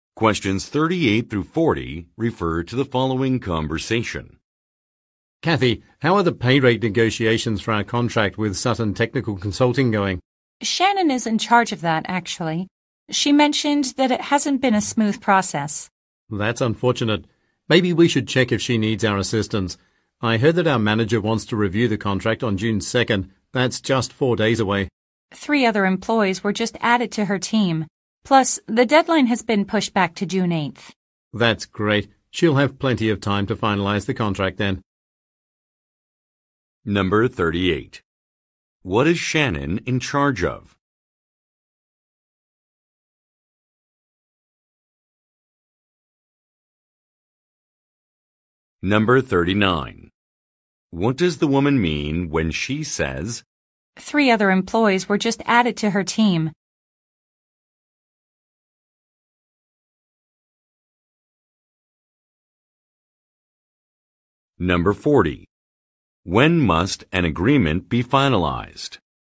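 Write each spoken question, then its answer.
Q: What is Shannon in charge of?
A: Negotiating pay rates for a contract with Sutton Technical Consulting

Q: When must an agreement be finalized?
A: By June 8th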